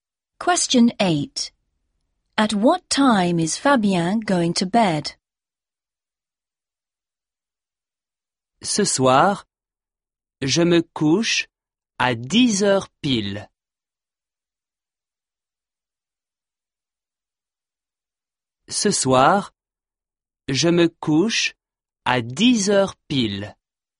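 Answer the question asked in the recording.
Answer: At 10 o'clock exactly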